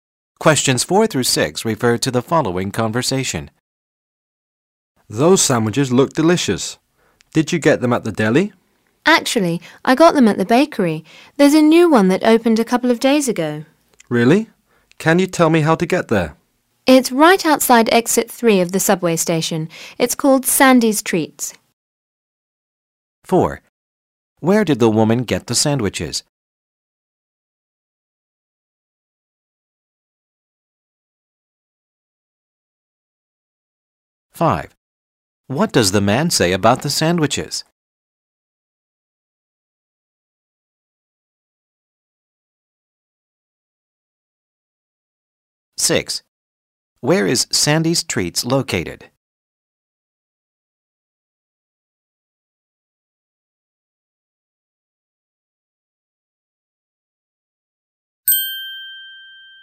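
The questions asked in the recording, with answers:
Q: Where did the woman get the sandwiches?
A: At a new bakery

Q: What does the man say about the sandwiches?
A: They look delicious

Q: Where is Sandy's Treats located?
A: Right outside exit 3 of the subway station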